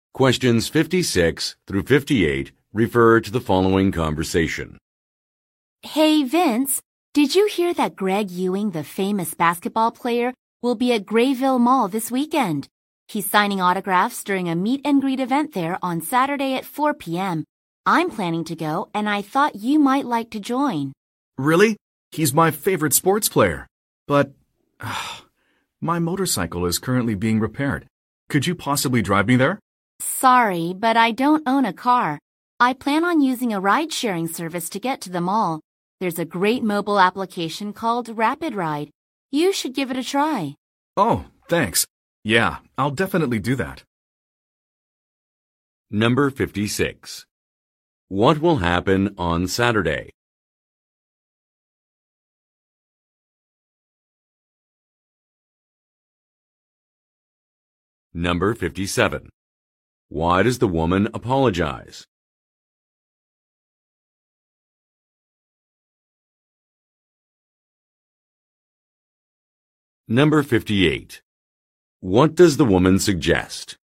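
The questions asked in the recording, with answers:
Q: What will happen on Saturday?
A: A famous basketball player will sign autographs at a meet-and-greet at Grayville Mall.

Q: Why does the woman apologize?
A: She doesn't own a car, so she can't drive him.

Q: What does the woman suggest?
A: Trying the Rapid Ride ride-sharing app.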